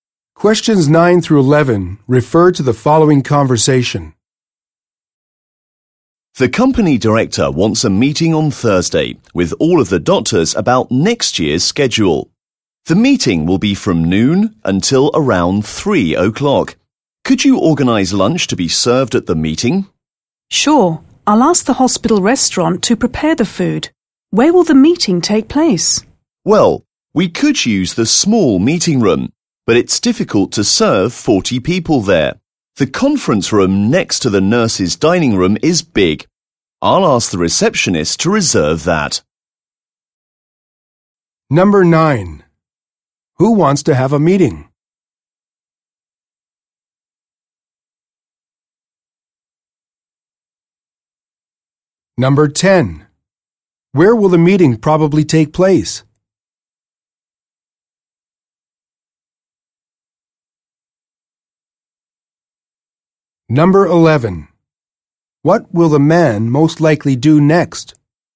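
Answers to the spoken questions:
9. The company director
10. In the conference room next to the nurse's dining room
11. Ask the receptionist to reserve the conference room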